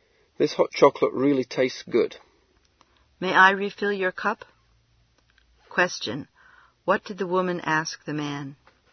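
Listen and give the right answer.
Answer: Whether he wanted more hot chocolate.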